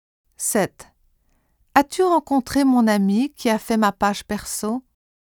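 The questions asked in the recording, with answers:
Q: As-tu rencontré mon ami qui a fait ma page perso?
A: qui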